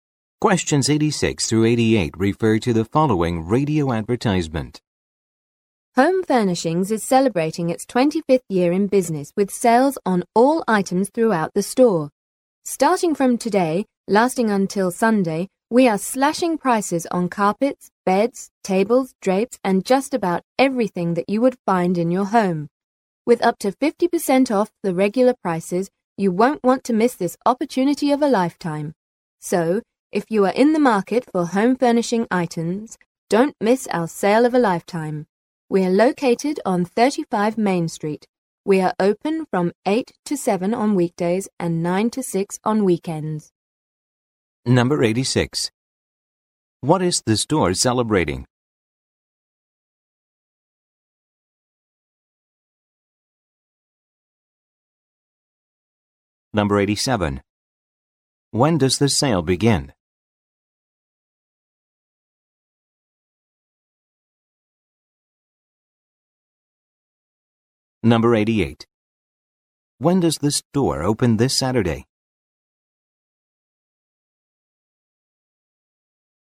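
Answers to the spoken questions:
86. 25 years in business
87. Today
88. At 9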